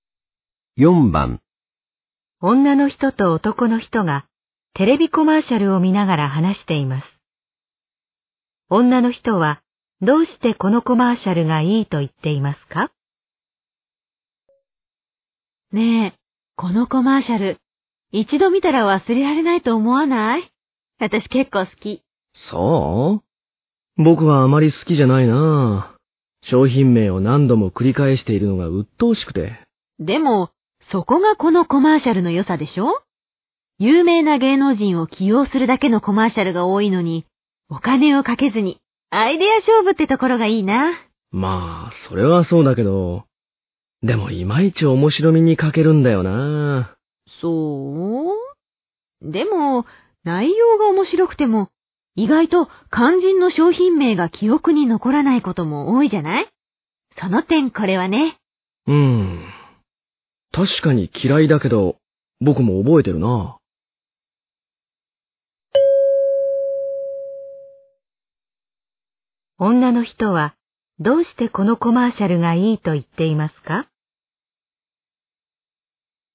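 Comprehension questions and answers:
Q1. 女の人はどうしてこのコマーシャルがいいと言っていますか?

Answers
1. 商品名が記憶に残るから

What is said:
女の人と男の人がテレビコマーシャルを見ながら話しています。女の人はどうしてこのコマーシャルがいいと言っていますか?
女:ねえ。このコマーシャル、一度ま見たら忘れられないと思わない?私結構好き。
男:総?僕はあまり好きじゃないな。商品名をなんども繰り返しているのがうっとうしくて。
女:でも、そこがこのコマーシャルの良さでしょう。有名な芸能人を起用するだけのコマーシャルが多いのに、お金をかけずにアイデイア勝負ってところがいいな。
男:まあ、それはそうだけど。今一面白みに賭けるんだよな。
女:そう。でも、ないようがおもしろくても、意外と肝心の商品名が記憶に残らないことも多いんじゃない?その点、コラはね...。
男:うん。確かに嫌いだけど、僕は覚えているな。

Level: N1级别听力题库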